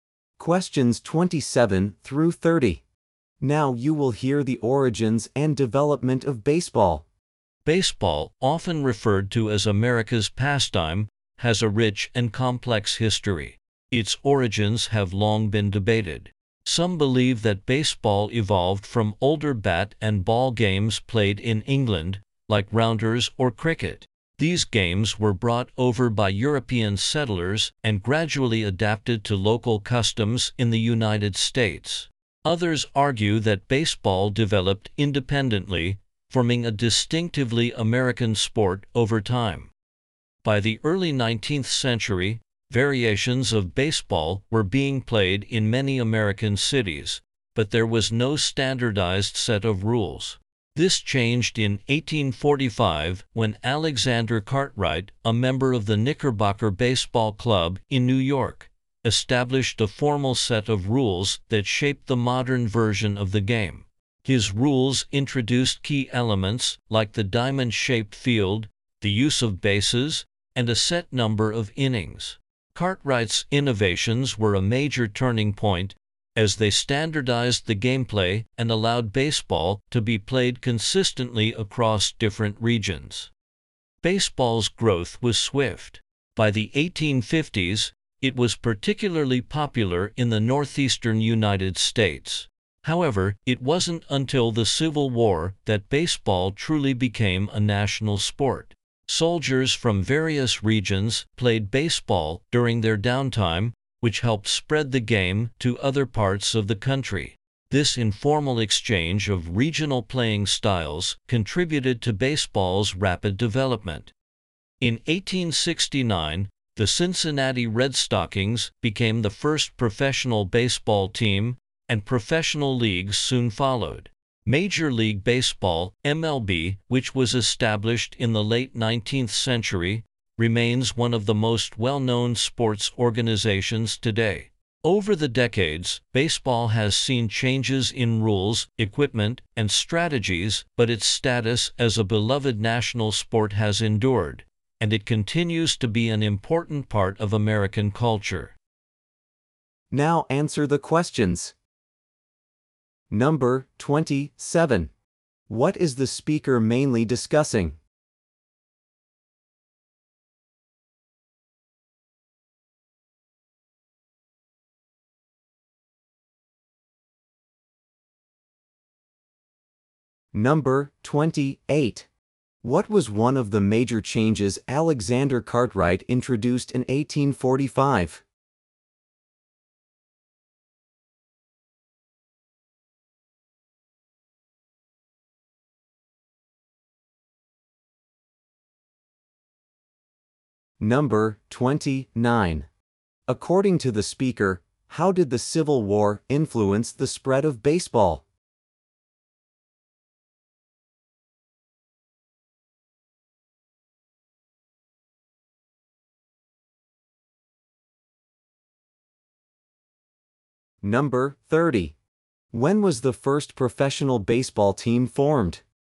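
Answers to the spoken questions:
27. The origins and development of baseball
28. The diamond-shaped field
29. Soldiers from different regions played it and spread it across the country
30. 1869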